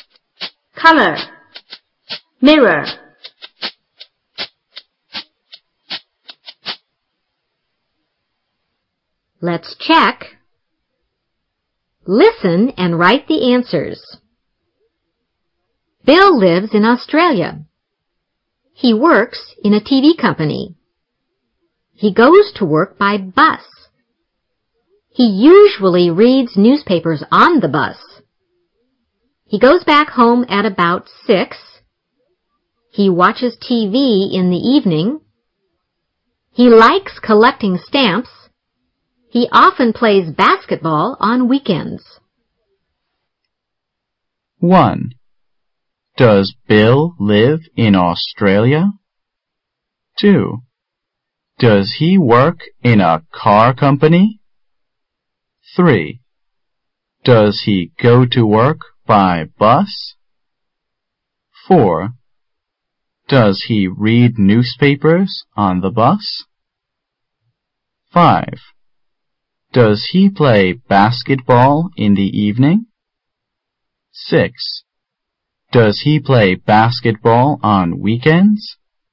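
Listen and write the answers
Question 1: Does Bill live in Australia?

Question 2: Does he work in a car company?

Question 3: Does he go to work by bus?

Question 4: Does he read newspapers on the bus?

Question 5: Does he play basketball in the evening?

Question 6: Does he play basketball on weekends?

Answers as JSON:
{"1": "Yes, he does.", "2": "No, he doesn't.", "3": "Yes, he does.", "4": "Yes, he does.", "5": "No, he doesn't.", "6": "Yes, he does."}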